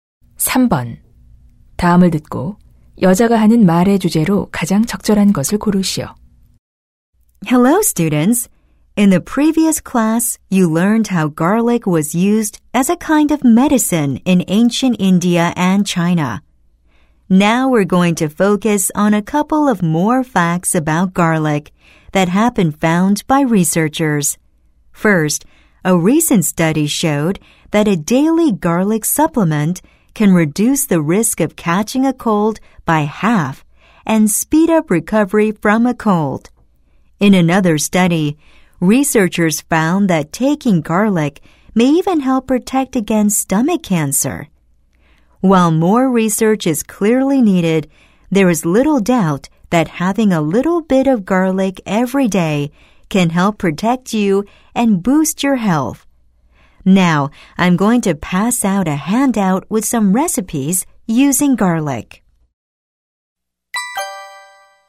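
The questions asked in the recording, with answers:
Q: 다음을 듣고 여자가 하는 말의 주제로 가장 적절한 것을 고르시오.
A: 마늘의 건강상 이점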